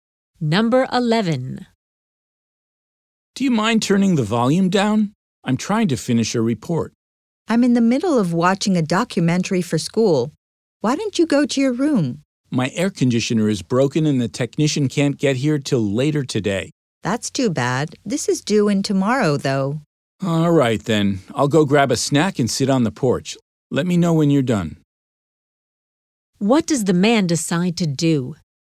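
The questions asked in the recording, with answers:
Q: What does the man decide to do?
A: Get a snack and sit on the porch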